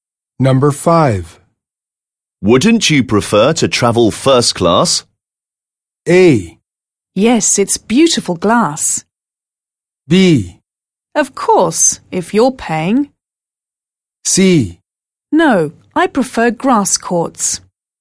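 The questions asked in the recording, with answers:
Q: Wouldn't you prefer to travel first class?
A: B: Of course, if you're paying.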